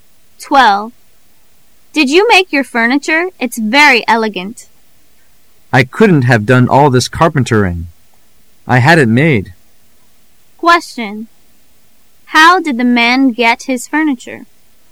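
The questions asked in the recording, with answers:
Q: How did the man get his furniture?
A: He had it made by someone else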